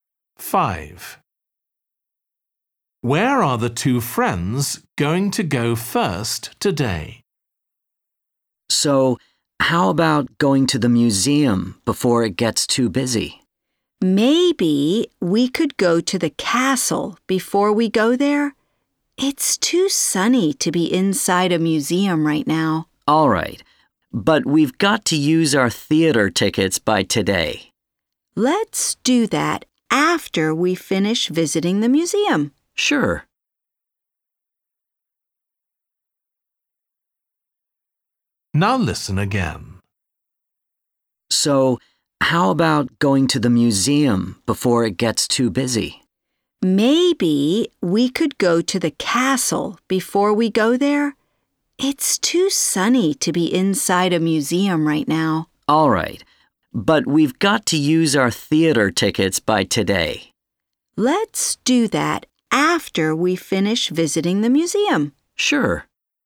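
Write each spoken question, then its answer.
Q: Where are the two friends going to go first today?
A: the castle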